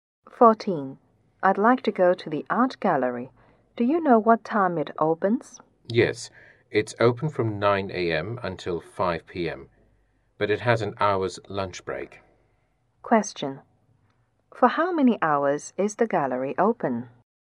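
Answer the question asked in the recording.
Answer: 7 hours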